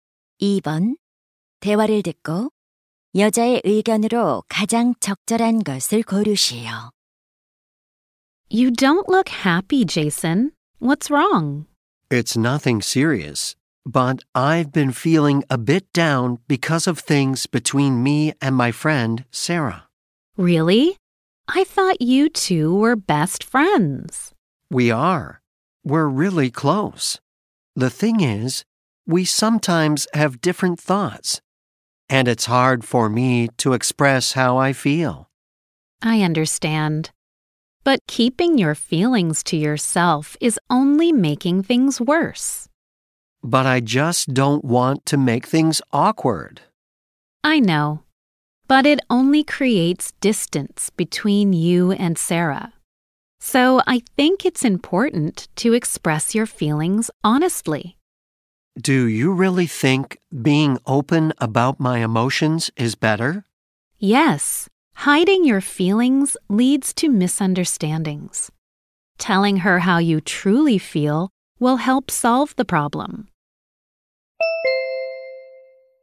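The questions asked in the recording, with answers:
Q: 대화를 듣고 여자의 의견으로 가장 적절한 것을 고르시오.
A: 친구에게 자신의 감정을 솔직하게 표현하는 것이 중요하다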